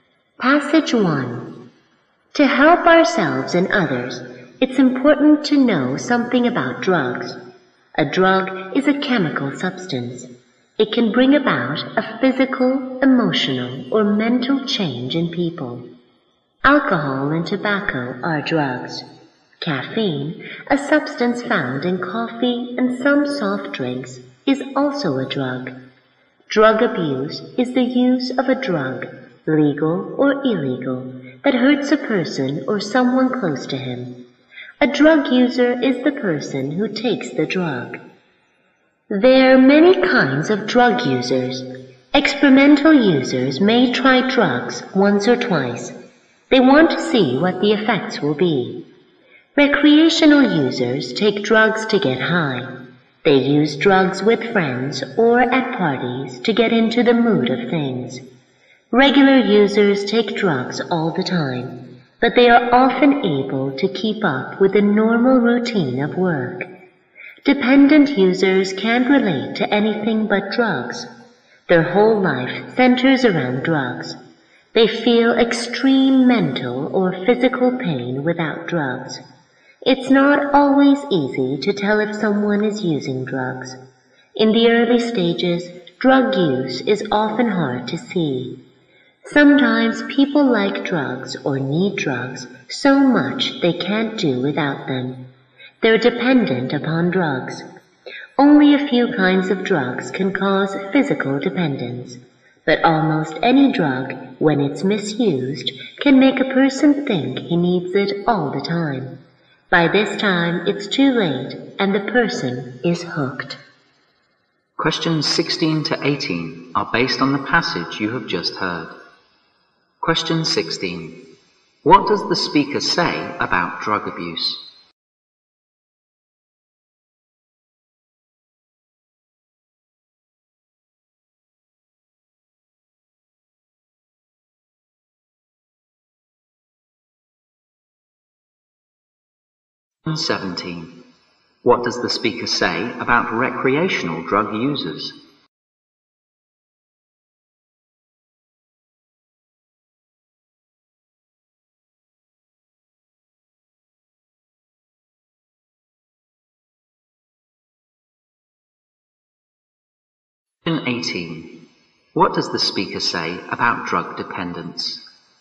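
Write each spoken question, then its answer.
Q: What does the speaker say about drug abuse?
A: It is use of any drug, legal or illegal, that hurts the user or someone close

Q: What does the speaker say about recreational drug users?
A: They take drugs to get high, with friends or at parties

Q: What does the speaker say about drug dependence?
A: Only a few drugs cause physical dependence, but misuse of almost any drug can make one feel dependent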